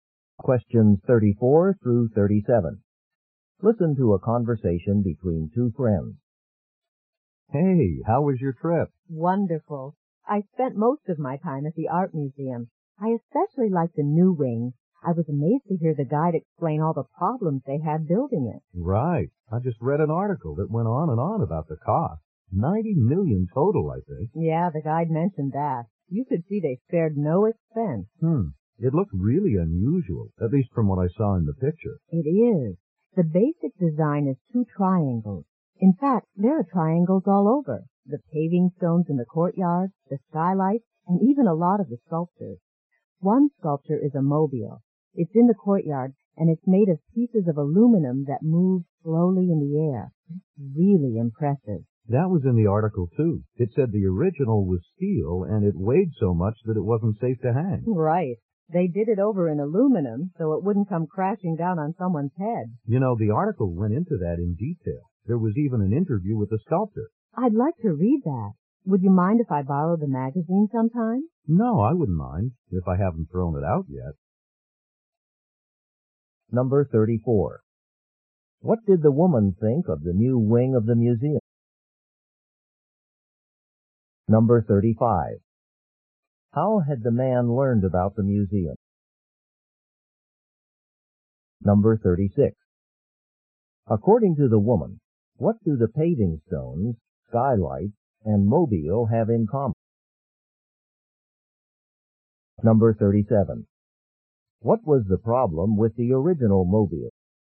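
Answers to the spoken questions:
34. She liked it a lot and found it impressive
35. From a magazine article
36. They are all triangles
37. It was steel and too heavy to hang safely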